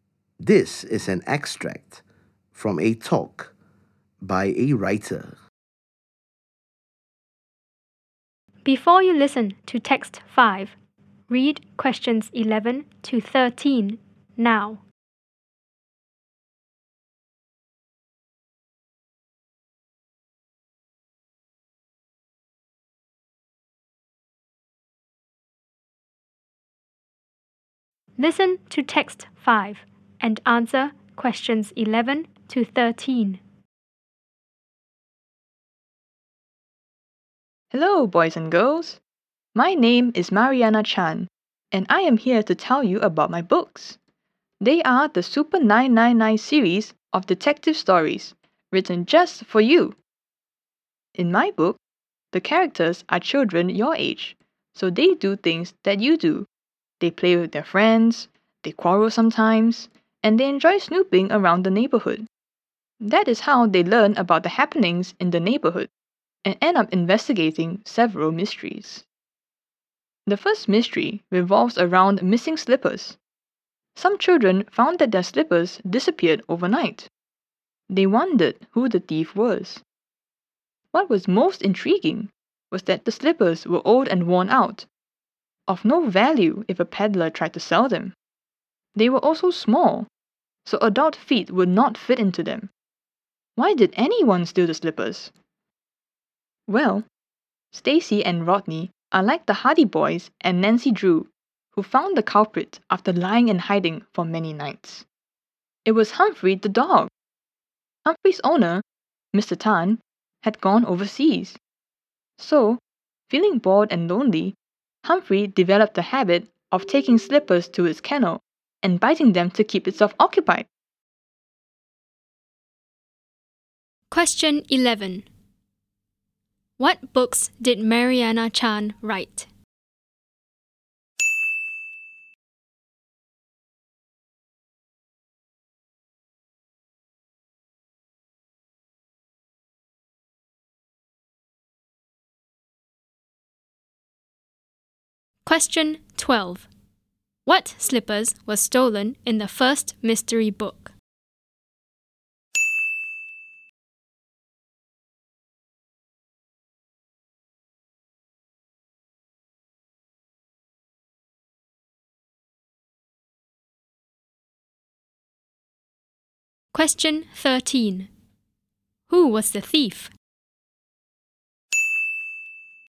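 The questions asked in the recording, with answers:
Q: What books did Mariana Chan write?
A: The Super 999 series of detective stories

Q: What slippers were stolen in the first mystery book?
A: Old, worn-out, small (children's) slippers

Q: Who was the thief?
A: Humphrey the dog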